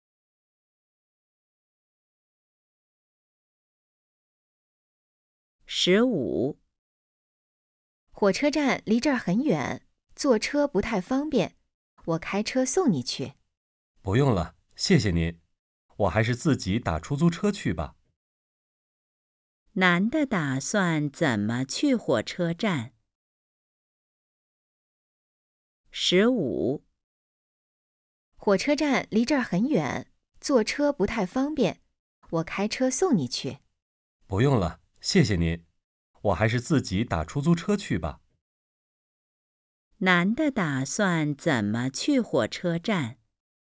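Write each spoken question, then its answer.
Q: 男的打算怎么去火车站?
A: 打出租车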